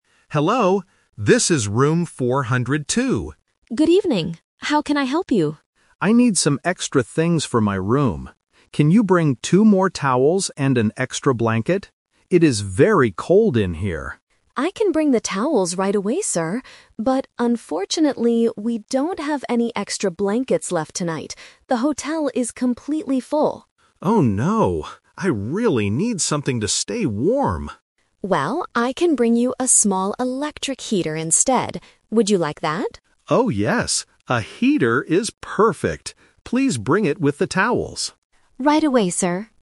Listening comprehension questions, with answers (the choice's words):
Listen to a guest talking to a hotel staff member on the phone. Choose the correct answer (A, B, or C) for each question.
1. What did the guest ask for at the beginning?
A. Two blankets and a towel.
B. Two towels and a blanket.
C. A new heater and a towel.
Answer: Two towels and a blanket.

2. What is the problem at the hotel?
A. They do not have any extra blankets.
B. The heater in room 402 is broken.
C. They do not have clean towels.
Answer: They do not have any extra blankets.

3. What will the staff bring to the room? (The Twist)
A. Two towels and a blanket.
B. Only a small heater.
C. Two towels and a heater.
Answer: Two towels and a heater.

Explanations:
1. The guest explicitly states his request: "Can you bring two more towels and an extra blanket?" Trap: Option A switches the numbers (two blankets instead of two towels). Option C is a trap because the heater is mentioned later, but it wasn't what he asked for at the beginning.
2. The staff member clearly says, "...unfortunately, we don't have any extra blankets left tonight." Trap: Option B is a plausible reason why the room is cold, but it is never mentioned in the audio. Option C is wrong because the staff says they can bring the towels right away.
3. This is the Twist. The guest originally wanted a blanket, but because they are out of them, he agrees to a new plan. He says, "A heater is perfect. Please bring it with the towels." Trap: Option A is what the guest planned to get at first. Option B is incorrect because he still needs the towels along with the heater.

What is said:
Guest: Hello, this is room 402.
Staff: Good evening. How can I help you?
Guest: I need some extra things for my room. Can you bring two more towels and an extra blanket? It is very cold in here.
Staff: I can bring the towels right away, sir. But unfortunately, we don't have any extra blankets left tonight. The hotel is completely full.
Guest: Oh no. I really need something to stay warm.
Staff: Well, I can bring you a small electric heater instead. Would you like that?
Guest: Oh, yes. A heater is perfect. Please bring it with the towels.
Staff: Right away, sir.